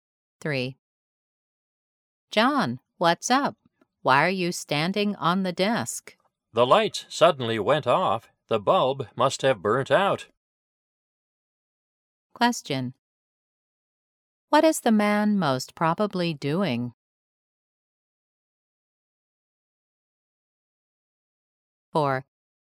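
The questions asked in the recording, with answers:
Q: What is the man most probably doing?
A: Changing a light bulb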